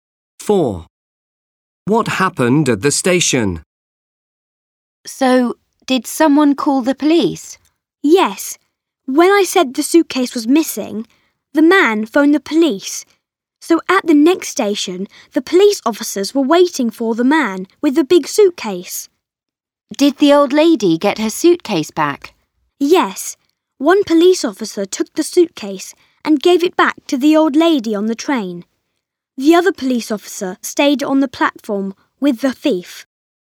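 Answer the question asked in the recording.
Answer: Police officers were waiting, gave the suitcase back to the old lady and kept the thief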